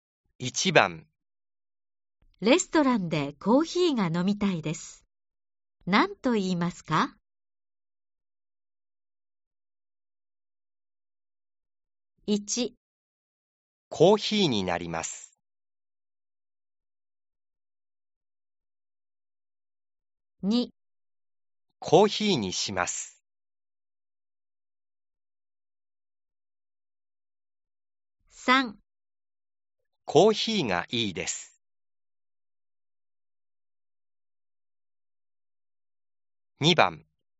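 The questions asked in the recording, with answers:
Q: レストランでコーヒーが飲みたいです。何と言いますか ?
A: 2: コーヒーにします。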